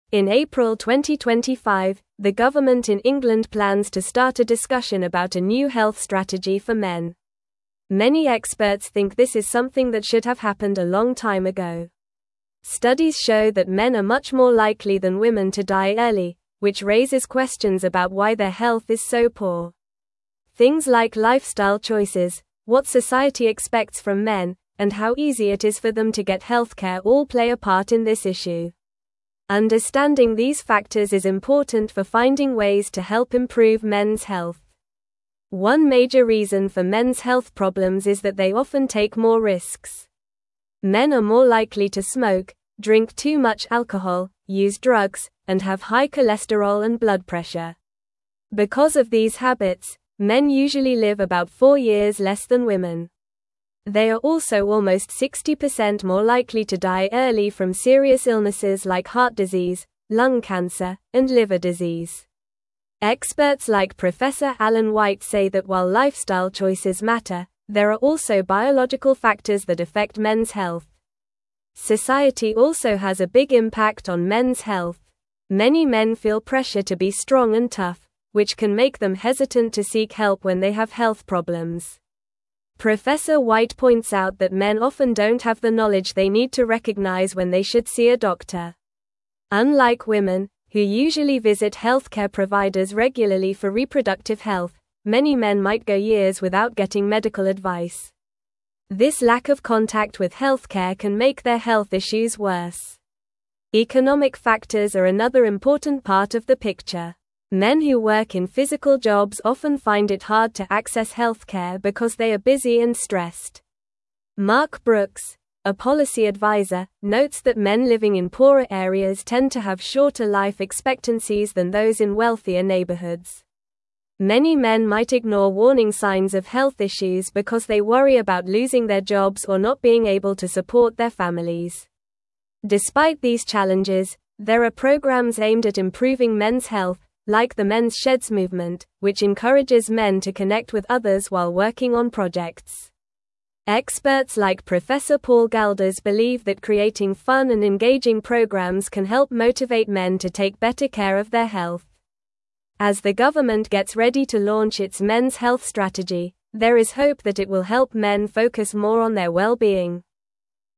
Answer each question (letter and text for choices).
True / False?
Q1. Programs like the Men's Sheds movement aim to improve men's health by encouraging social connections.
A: True

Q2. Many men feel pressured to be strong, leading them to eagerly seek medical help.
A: False

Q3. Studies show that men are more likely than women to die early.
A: True

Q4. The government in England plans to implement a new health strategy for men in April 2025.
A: False

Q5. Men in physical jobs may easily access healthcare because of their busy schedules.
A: False

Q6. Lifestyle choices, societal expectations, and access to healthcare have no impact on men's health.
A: False

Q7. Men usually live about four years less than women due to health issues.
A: True

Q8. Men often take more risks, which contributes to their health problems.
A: True

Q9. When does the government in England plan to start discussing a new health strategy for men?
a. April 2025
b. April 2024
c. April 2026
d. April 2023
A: a. April 2025

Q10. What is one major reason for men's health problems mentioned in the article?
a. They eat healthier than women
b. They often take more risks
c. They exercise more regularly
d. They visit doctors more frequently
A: b. They often take more risks

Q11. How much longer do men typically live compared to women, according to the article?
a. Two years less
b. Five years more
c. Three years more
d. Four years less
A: d. Four years less

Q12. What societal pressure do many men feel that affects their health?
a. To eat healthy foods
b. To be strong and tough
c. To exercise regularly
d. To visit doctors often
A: b. To be strong and tough

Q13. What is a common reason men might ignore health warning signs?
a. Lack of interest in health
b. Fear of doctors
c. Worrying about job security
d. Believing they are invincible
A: c. Worrying about job security

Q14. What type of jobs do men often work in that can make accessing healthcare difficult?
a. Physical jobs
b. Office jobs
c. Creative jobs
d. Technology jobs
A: a. Physical jobs

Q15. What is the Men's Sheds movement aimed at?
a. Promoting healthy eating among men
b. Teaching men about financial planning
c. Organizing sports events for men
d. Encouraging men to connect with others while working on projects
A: d. Encouraging men to connect with others while working on projects

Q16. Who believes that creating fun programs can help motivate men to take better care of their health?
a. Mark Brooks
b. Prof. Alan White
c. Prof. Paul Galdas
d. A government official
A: c. Prof. Paul Galdas

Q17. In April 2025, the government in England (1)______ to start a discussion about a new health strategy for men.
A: plans

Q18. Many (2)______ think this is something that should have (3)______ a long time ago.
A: experts

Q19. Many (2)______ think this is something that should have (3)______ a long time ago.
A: happened

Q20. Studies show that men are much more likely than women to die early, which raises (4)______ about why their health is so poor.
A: questions

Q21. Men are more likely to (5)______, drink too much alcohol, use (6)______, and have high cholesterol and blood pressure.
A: smoke

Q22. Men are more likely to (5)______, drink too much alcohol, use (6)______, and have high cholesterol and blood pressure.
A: drugs

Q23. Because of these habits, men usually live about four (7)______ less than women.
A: years

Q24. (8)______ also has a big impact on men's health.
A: Society

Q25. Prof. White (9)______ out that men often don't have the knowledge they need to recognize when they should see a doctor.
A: points

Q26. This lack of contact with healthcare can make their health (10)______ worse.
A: issues

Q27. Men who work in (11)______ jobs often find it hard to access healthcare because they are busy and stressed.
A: physical

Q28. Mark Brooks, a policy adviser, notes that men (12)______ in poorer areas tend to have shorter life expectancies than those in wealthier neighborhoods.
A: living

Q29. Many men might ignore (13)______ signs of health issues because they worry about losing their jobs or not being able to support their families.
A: warning

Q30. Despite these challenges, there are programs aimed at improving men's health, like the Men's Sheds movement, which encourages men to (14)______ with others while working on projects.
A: connect

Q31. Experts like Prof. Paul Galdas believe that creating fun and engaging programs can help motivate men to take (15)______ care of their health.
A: better

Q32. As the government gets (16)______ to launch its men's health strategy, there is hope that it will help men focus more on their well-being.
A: ready

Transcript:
In April 2025, the government in England plans to start a discussion about a new health strategy for men. Many experts think this is something that should have happened a long time ago. Studies show that men are much more likely than women to die early, which raises questions about why their health is so poor. Things like lifestyle choices, what society expects from men, and how easy it is for them to get healthcare all play a part in this issue. Understanding these factors is important for finding ways to help improve men's health.
One major reason for men's health problems is that they often take more risks. Men are more likely to smoke, drink too much alcohol, use drugs, and have high cholesterol and blood pressure. Because of these habits, men usually live about four years less than women. They are also almost 60% more likely to die early from serious illnesses like heart disease, lung cancer, and liver disease. Experts like Prof. Alan White say that while lifestyle choices matter, there are also biological factors that affect men's health.
Society also has a big impact on men's health. Many men feel pressure to be strong and tough, which can make them hesitant to seek help when they have health problems. White points out that men often don't have the knowledge they need to recognize when they should see a doctor. Unlike women, who usually visit healthcare providers regularly for reproductive health, many men might go years without getting medical advice. This lack of contact with healthcare can make their health issues worse.
Economic factors are another important part of the picture. Men who work in physical jobs often find it hard to access healthcare because they are busy and stressed. Mark Brooks, a policy adviser, notes that men living in poorer areas tend to have shorter life expectancies than those in wealthier neighborhoods. Many men might ignore warning signs of health issues because they worry about losing their jobs or not being able to support their families. Despite these challenges, there are programs aimed at improving men's health, like the Men's Sheds movement, which encourages men to connect with others while working on projects. Experts like Prof. Paul Galdas believe that creating fun and engaging programs can help motivate men to take better care of their health. As the government gets ready to launch its men's health strategy, there is hope that it will help men focus more on their well-being.

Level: Level 3